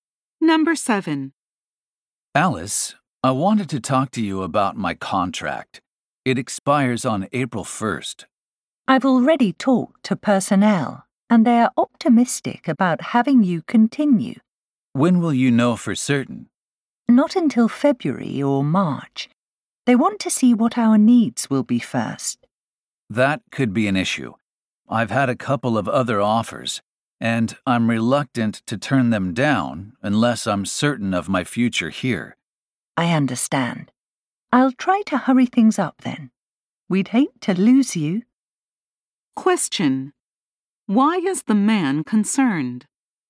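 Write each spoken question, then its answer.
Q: Why is the man concerned?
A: He won't know if his contract is renewed until after he must answer other job offers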